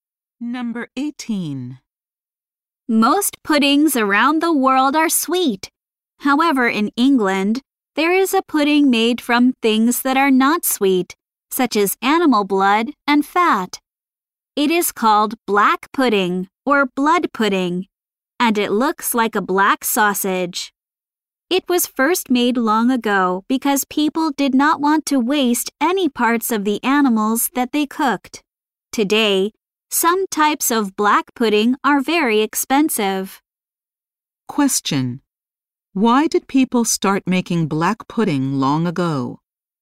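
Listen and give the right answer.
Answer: They did not want to waste any parts of the animals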